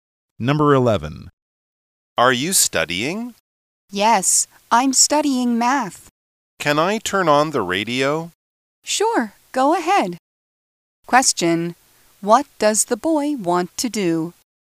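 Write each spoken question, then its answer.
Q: What does the boy want to do?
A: Turn on the radio.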